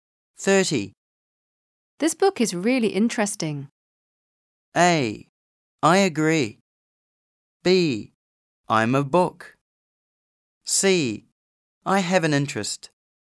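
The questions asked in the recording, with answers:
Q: This book is really interesting.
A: A: I agree.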